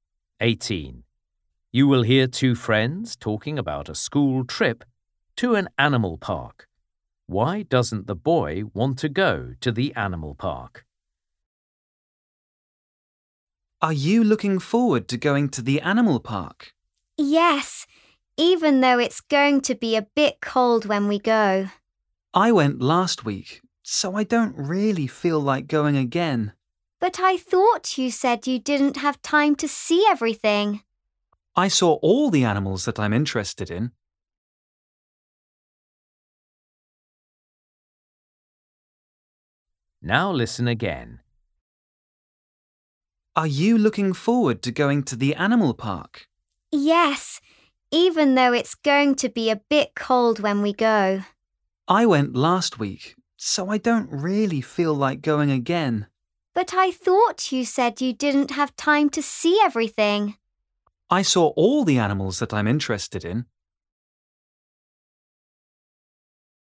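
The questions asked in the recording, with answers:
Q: Why doesn't the boy want to go to the animal park?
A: He went last week and saw all the animals he's interested in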